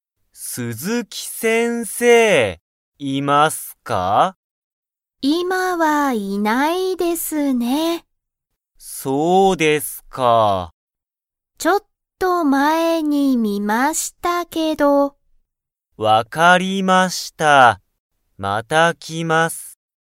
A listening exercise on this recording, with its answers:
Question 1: 鈴木先生(すずきせんせい)は今(いま)、いますか?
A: いいえ

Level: Level 1